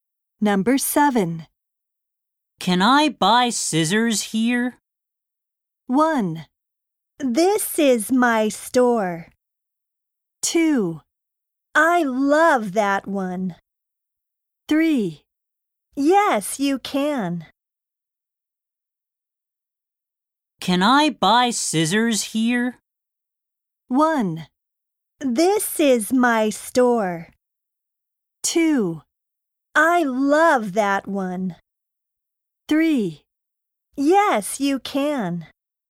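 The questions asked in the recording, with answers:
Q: Can I buy scissors here?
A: 3: Yes, you can.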